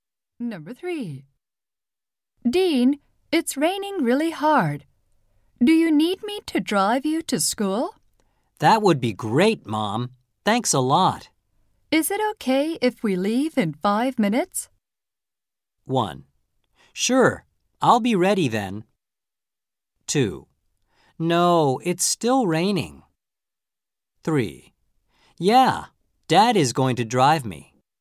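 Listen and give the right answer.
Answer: 1: Sure, I'll be ready then.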